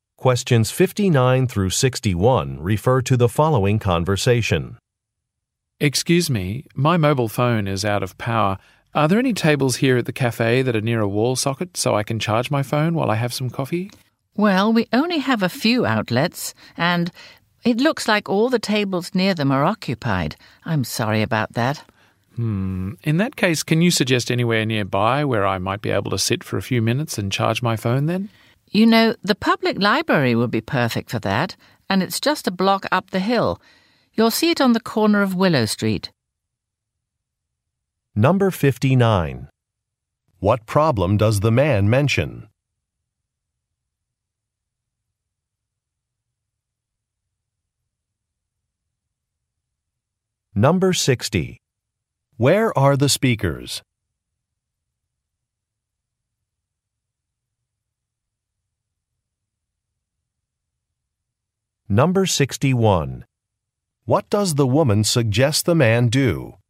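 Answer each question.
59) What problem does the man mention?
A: His phone battery is empty.

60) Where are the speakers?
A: At a coffee shop

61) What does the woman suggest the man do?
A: Go to the library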